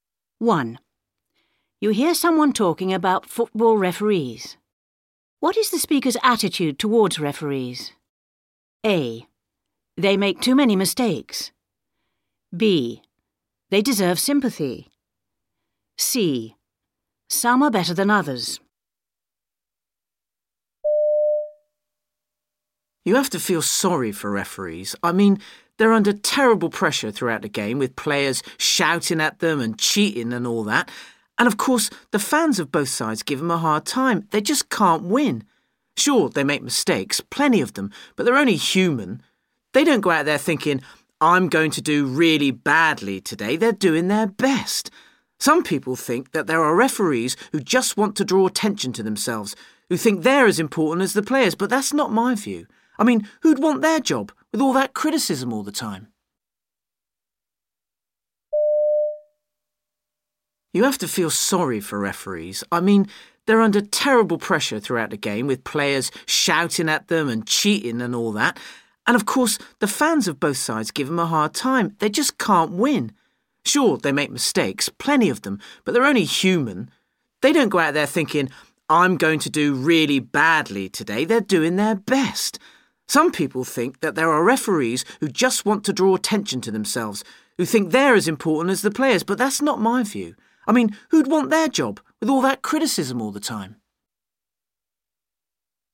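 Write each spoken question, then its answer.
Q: What is the speaker's attitude towards referees?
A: B: They deserve sympathy.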